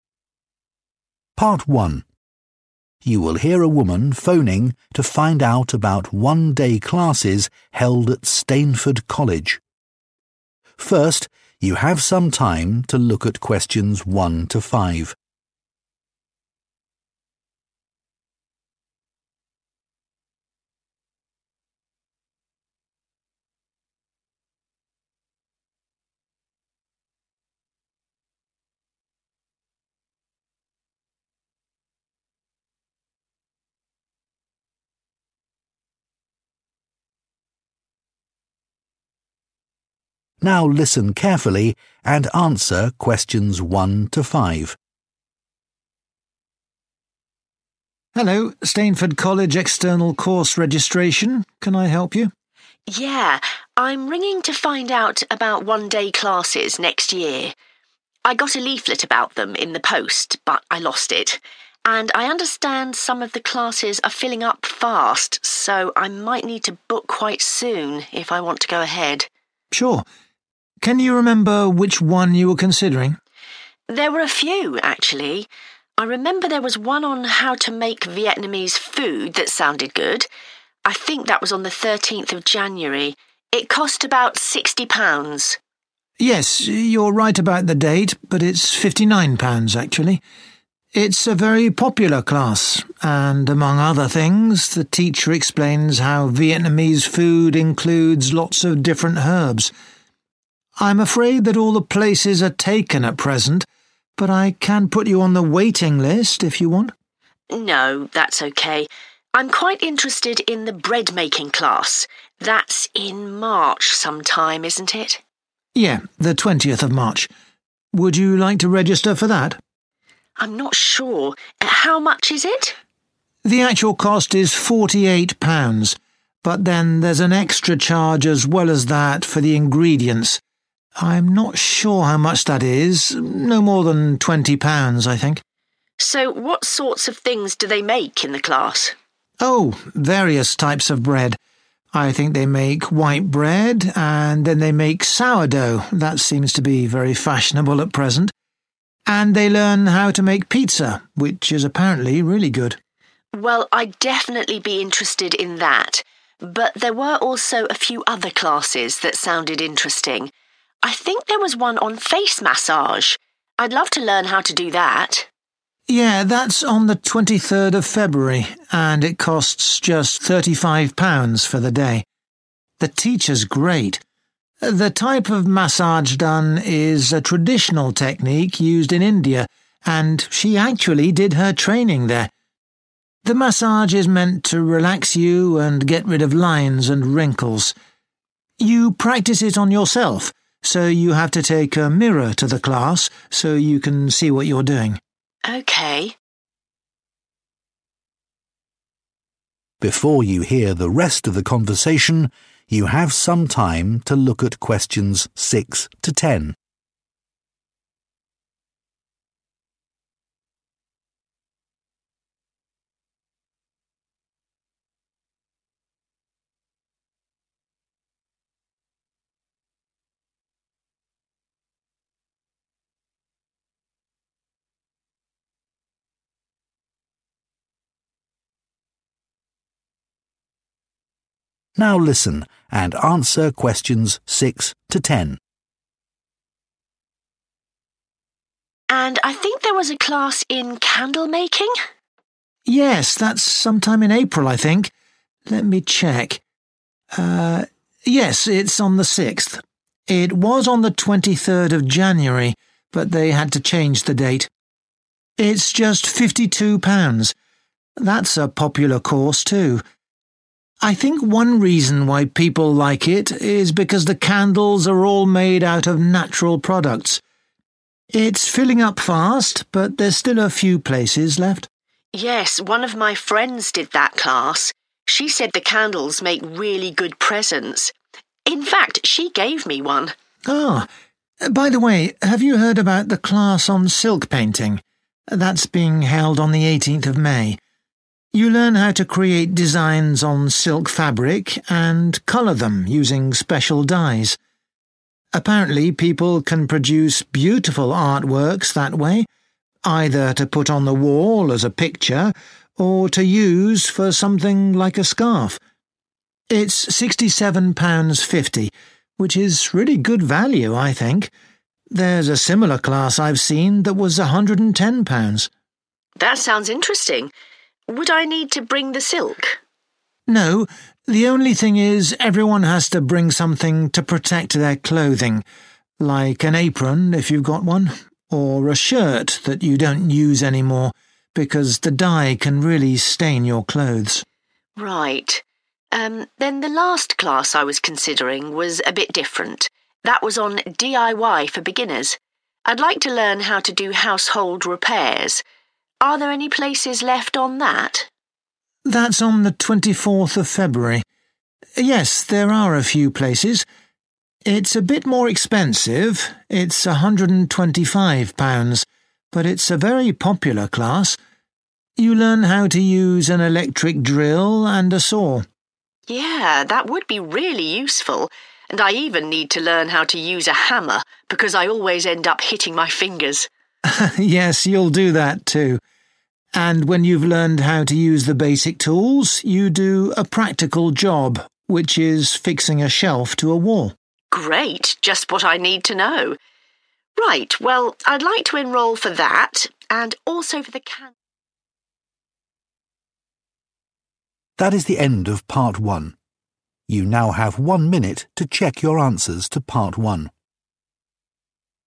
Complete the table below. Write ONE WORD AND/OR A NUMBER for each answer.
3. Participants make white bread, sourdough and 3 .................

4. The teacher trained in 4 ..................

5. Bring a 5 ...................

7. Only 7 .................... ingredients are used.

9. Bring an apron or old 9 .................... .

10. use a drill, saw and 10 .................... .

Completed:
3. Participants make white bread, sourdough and pizza
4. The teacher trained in India
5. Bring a mirror
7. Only natural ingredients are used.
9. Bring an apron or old shirt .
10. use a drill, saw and hammer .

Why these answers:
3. Từ cần điền là một danh từ, hoặc tên của một loại thực phẩm (ở đây có thể là một loại bánh mì như bread, sourdough). Đáp án là pizza.
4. Từ cần điền là một danh từ/danh động từ/tên của một địa điểm. Đáp án là India. Man: The type of massage done is a traditional technique in India, and she actually did her training there.
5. Từ cần điền là một danh từ đếm được số ít. Đáp án là mirror. Man: You practise it on yourself, so you have to take a mirror to the class so you can see what you're doing.
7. Từ cần điền là một tính từ, vì nằm trước danh từ chính "ingredients". Đáp án là natural. Man: I think one reason why people like it is because the candles are all made out of natural products.
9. Từ cần điền là một danh từ, vì trước đó có danh từ "apron" + liên từ "or", thể hiện ý "[danh từ] HOẶC [danh từ]. Đáp án là shirt Lưu ý: lời thoại của người phụ nữ là đáp án nhiễu vì có xuất hiện từ "bring". Cần phải tập trung nghe câu sau để xác nhận đáp án có đúng là "silk" hay không. Woman: Would I need to bring the silk?
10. Từ cần điền là một danh từ, có thể là từ chỉ công cụ làm việc tương ứng với "drill" (mũi khoan) và "saw" (lưỡi cưa). Đáp án là hammer. Man: You'll learn how to use an electric drill and a saw.

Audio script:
PART 1
Presenter: You will hear a woman phoning to find out about one-day classes held at Stainford College. First, you have some time to look at questions 1 to 5.
Presenter: Now listen carefully and answer questions 1 to 5.
College Staff: Hello, Stainford College external course registration. Can I help you?
I got a leaflet about them in the post, but I lost it. And I understand some of the classes are filling up fast, so I might need to book quite soon if I want to go ahead.
College Staff: Sure. Can you remember which one you were considering?
Woman: There were a few, actually. I remember there was one on how to make Vietnamese food that sounded good. I think that was on the 13th of January. It cost about 60 pounds.
College Staff: Yes, you're right about the date, but it's 59 pounds actually. It's a very popular class, and among other things, the teacher explains how Vietnamese food includes lots of different herbs. I'm afraid that all the places are taken at present, but I can put you on the waiting list if you want.
Woman: No, that's okay. I'm quite interested in the bread making class. That's in March sometime, isn't it?
College Staff: Yeah, the 20th of March. Would you like to register for that?
Woman: I'm not sure. How much is it?
College Staff: The actual cost is 48 pounds, but then there's an extra charge as well as that for the ingredients. I'm not sure how much that is, no more than 20 pounds, I think.
Woman: So what sorts of things do they make in the class?
College Staff: Oh, various types of bread. I think they make white bread, and then they make sourdough, that seems to be very fashionable at present. And they learn how to make pizza, which is apparently really good.
Woman: Well, I'd definitely be interested in that. But there were also a few other classes that sounded interesting. I think there was one on face massage. I'd love to learn how to do that.
College Staff: Yeah, that's on the 23rd of February, and it costs just 35 pounds for the day. The teacher's great! The type of massage done is a traditional technique used in India, and she actually did her training there. The massage is meant to relax you and get rid of lines and wrinkles. You practice it on yourself, so you have to take a mirror to the class, so you can see what you're doing.
Woman: Okay.
Presenter: Before you hear the rest of the conversation, you have some time to look at questions 6 to 10.
Presenter: Now listen and answer questions 6 to 10.
Woman: And I think there was a class in candle making?
College Staff: Yes, that's sometime in April, I think. Let me check... Ah, yes, it's on the 6th. It was on the 23rd of January, but they had to change the date. It's just 52 pounds. That's a popular course, too. I think one reason why people like it is because the candles are all made out of natural products. It's filling up fast, but there's still a few places left.
Woman: Yes, one of my friends did that class. She said the candles make really good presents. In fact, she gave me one.
College Staff: Ah! By the way, have you heard about the class on silk painting? That's being held on the 18th of May. You learn how to create designs on silk fabric and color them using special dyes. Apparently, people can produce beautiful artworks that way, either to put on the wall as a picture, or to use for something like a scarf. It's 67 pounds 50, which is really good value, I think. There's a similar class I've seen that was 110 pounds.
Woman: That sounds interesting. Would I need to bring the silk?
College Staff: No, the only thing is everyone has to bring something to protect their clothing, like an apron if you've got one, or a shirt that you don't use anymore, because the dye can really stain your clothes.
Woman: Right. Um, then the last class I was considering was a bit different. That was on DIY for beginners. I'd like to learn how to do household repairs. Are there any places left on that?
College Staff: That's on the 24th of February. Yes, there are a few places. It's a bit more expensive, it's 125 pounds, but it's a very popular class. You learn how to use an electric drill and a saw.
Woman: Yeah, that would be really useful. And I even need to learn how to use a hammer, because I always end up hitting my finger.
College Staff: (Laughs) Yes, you'll do that, too. And when you've learned how to use the basic tools, you do a practical job, which is fixing a shelf to a wall.
Woman: Great, just what I need to know. Right, well, I'd like to enroll for that, and also for the candle...